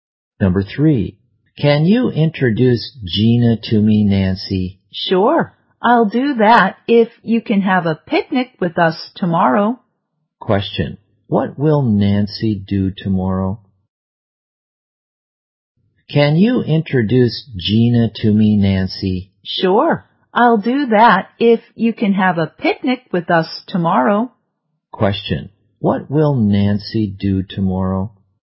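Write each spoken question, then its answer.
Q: Question, what will Nancy do tomorrow?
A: Have a picnic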